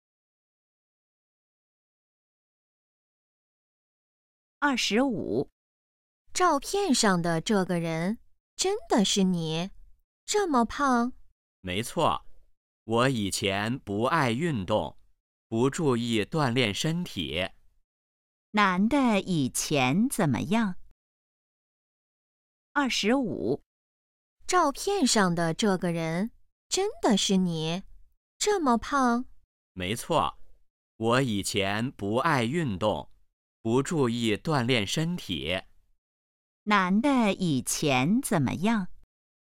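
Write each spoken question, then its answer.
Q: 男的以前怎么样?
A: 很胖,不爱运动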